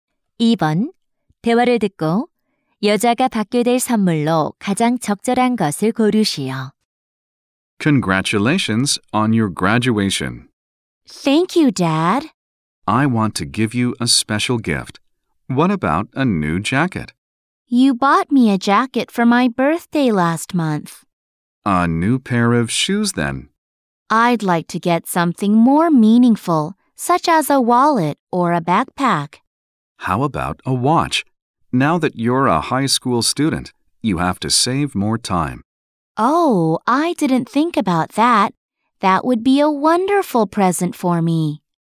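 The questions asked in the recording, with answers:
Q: 대화를 듣고 여자가 받게 될 선물로 가장 적절한 것을 고르시오.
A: 손목시계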